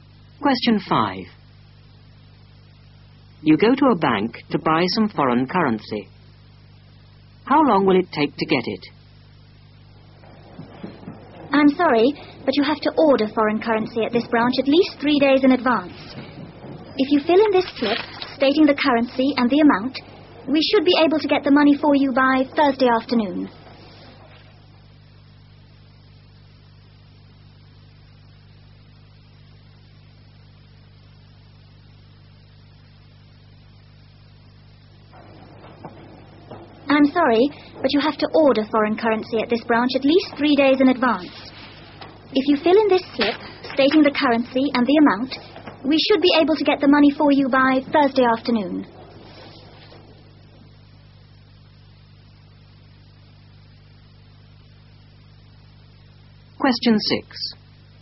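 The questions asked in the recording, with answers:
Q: How long will it take to get it?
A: At least 3 days (by Thursday afternoon)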